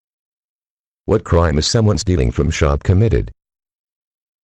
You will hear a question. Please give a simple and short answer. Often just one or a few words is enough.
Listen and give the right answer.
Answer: Shoplifting